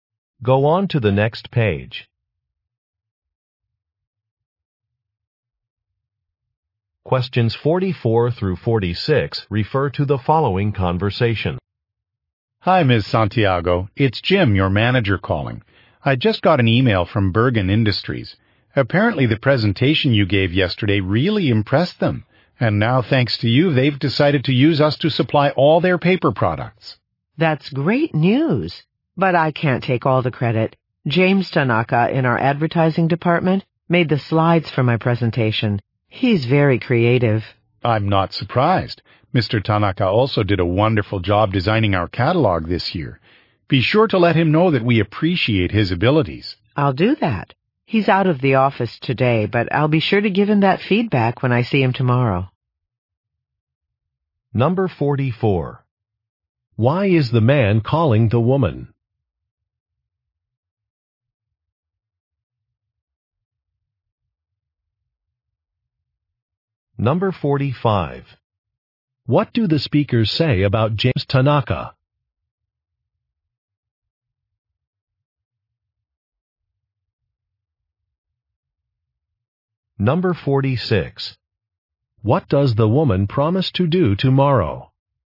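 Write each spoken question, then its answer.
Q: Why is the man calling the woman?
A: To share news that a client was impressed and signed on

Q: What do the speakers say about James Tanaka?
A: He is creative

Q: What does the woman promise to do tomorrow?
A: Give James Tanaka feedback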